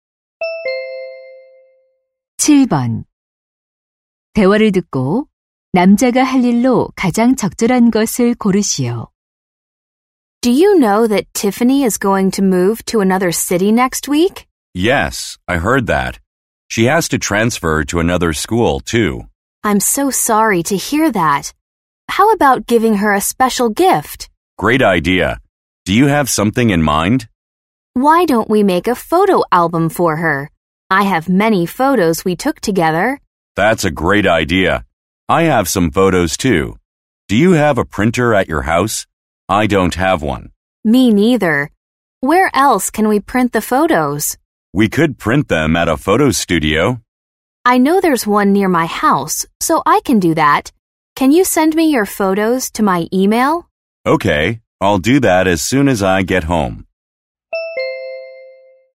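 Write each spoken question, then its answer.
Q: 대화를 듣고 남자가 할 일로 가장 적절한 것을 고르시오.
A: 사진관에서 사진 인화하기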